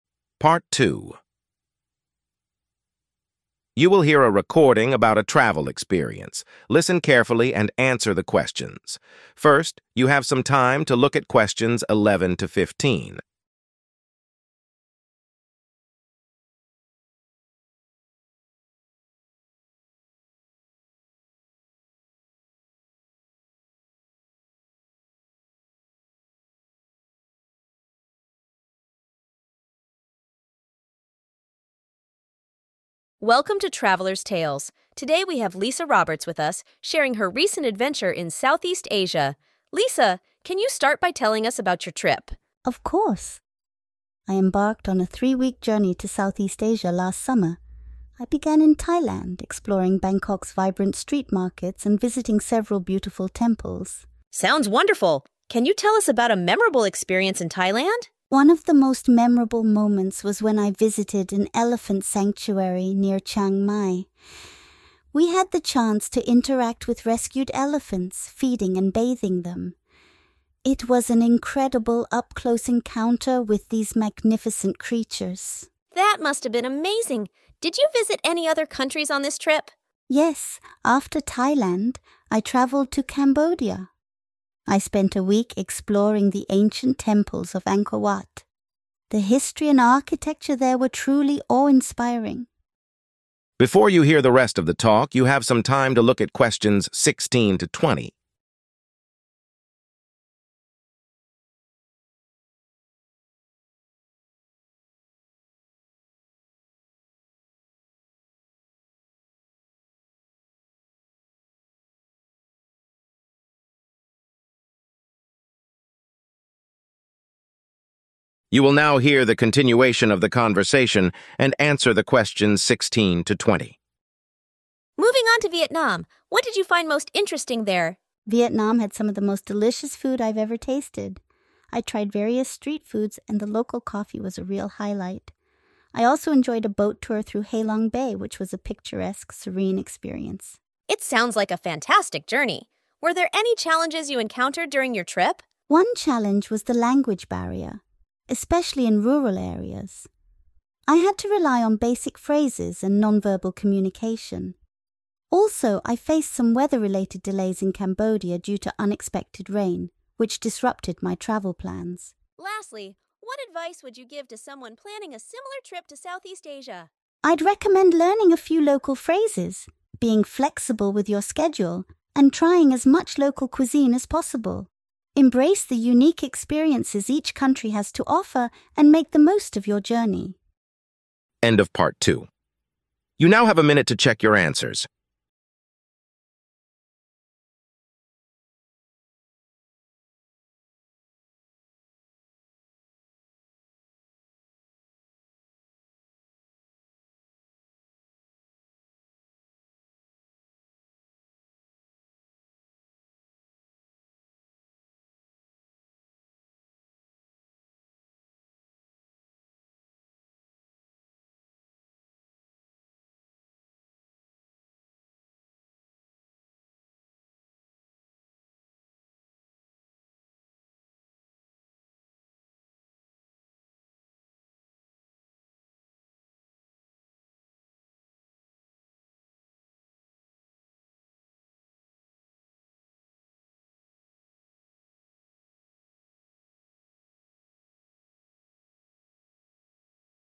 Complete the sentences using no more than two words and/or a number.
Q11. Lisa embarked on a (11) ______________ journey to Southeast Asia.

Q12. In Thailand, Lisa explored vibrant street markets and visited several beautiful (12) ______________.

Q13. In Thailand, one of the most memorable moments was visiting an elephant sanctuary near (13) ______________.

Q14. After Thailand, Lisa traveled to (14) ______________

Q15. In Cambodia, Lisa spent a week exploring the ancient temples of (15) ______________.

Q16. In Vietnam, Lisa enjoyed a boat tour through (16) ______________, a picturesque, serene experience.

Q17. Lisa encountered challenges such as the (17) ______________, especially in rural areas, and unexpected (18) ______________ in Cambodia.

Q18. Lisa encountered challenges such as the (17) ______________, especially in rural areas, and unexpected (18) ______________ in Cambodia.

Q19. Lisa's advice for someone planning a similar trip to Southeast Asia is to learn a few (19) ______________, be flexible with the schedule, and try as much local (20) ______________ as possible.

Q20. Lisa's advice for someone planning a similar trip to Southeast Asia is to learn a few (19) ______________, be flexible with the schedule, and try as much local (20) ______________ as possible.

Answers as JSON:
{"11": "3-week", "12": "temples", "13": "Chiang Mai", "14": "Cambodia", "15": "Angkor Wat", "16": "Halong Bay", "17": "language barrier", "18": "rain", "19": "local phrases", "20": "cuisine"}

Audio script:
Speaker: Welcome to "Traveler's Tales." Today, we have Lisa Roberts with us, sharing her recent adventure in Southeast Asia. Lisa, can you start by telling us about your trip?
Lisa: Of course! I embarked on a 3-week journey to Southeast Asia last summer. I began in Thailand, exploring Bangkok's vibrant street markets and visiting several beautiful temples.
Speaker: Sounds wonderful. Can you tell us about a memorable experience in Thailand?
Lisa: One of the most memorable moments was when I visited an elephant sanctuary near Chiang Mai. We had the chance to interact with rescued elephants, feeding and bathing them. It was an incredible, up-close encounter with these magnificent creatures.
Speaker: That must have been amazing. Did you visit any other countries on this trip?
Lisa: Yes, after Thailand, I traveled to Cambodia. I spent a week exploring the ancient temples of Angkor Wat. The history and architecture there were truly awe-inspiring.
Speaker: Moving on to Vietnam, what did you find most interesting there?
Lisa: Vietnam had some of the most delicious food I've ever tasted. I tried various street foods, and the local coffee was a real highlight. I also enjoyed a boat tour through Halong Bay, which was a picturesque, serene experience.
Speaker: It sounds like a fantastic journey. Were there any challenges you encountered during your trip?
Lisa: One challenge was the language barrier, especially in rural areas. I had to rely on basic phrases and non-verbal communication. Also, I faced some weather-related delays in Cambodia due to unexpected rain, which disrupted my travel plans.
Speaker: Lastly, what advice would you give to someone planning a similar trip to Southeast Asia?
Lisa: I'd recommend learning a few local phrases, being flexible with your schedule, and trying as much local cuisine as possible. Embrace the unique experiences each country has to offer, and make the most of your journey.